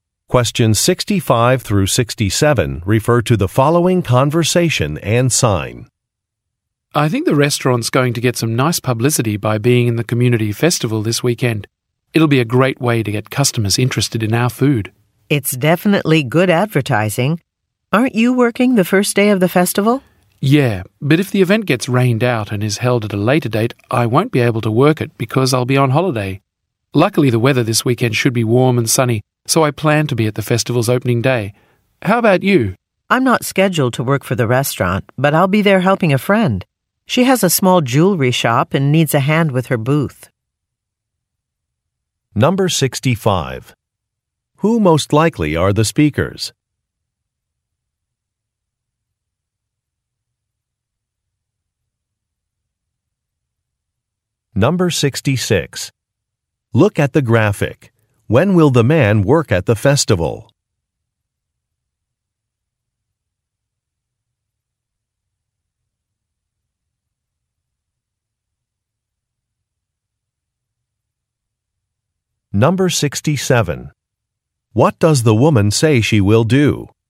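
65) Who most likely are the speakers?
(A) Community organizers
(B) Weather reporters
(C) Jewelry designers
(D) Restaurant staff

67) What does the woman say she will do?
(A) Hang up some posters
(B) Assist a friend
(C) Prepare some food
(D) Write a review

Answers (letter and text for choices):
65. (D) Restaurant staff
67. (B) Assist a friend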